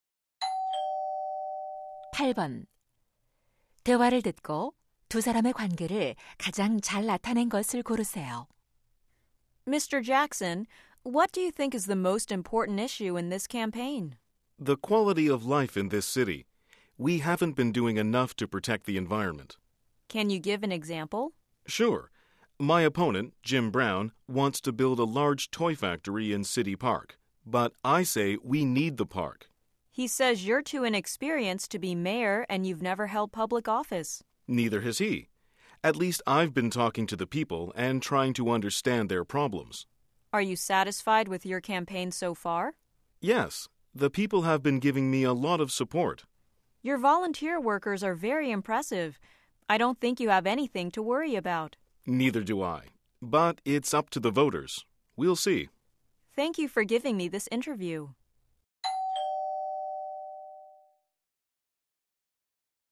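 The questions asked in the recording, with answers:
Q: 대화를 듣고 두 사람의 관계를 가장 잘 나타낸 것을 고르세요.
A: 기자 - 시장 후보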